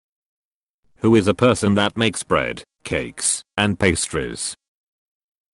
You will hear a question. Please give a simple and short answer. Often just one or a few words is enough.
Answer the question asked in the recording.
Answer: Baker